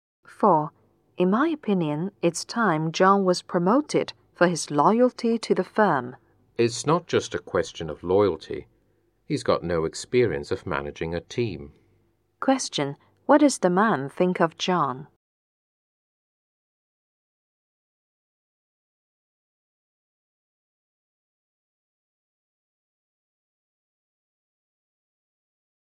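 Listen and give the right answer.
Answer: John shouldn't be promoted because he has no experience managing a team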